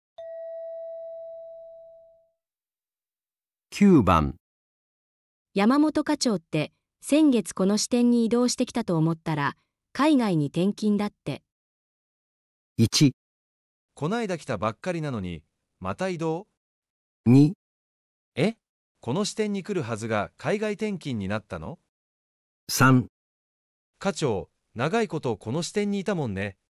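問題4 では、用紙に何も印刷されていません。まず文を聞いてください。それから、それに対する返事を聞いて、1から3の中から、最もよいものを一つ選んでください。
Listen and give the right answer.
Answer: 1

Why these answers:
对方表达"刚调来就要再调走",最自然的反应是感叹"才刚来就又要调动?",即选项1。选项2语序奇怪且把重点放在"原本要来这里";选项3则说"待了很久",与"才来一个月"矛盾。

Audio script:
3.課長、長いことこの支店にいたもんね。

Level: N1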